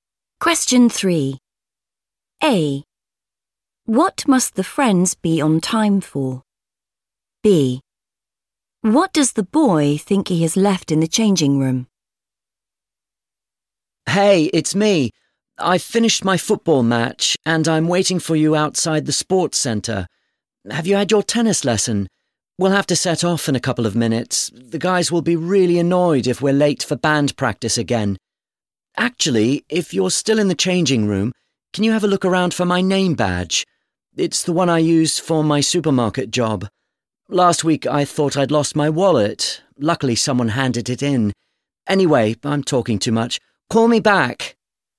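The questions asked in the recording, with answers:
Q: What must the friends be on time for?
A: band practice

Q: What does the boy think he has left in the changing room?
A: his name badge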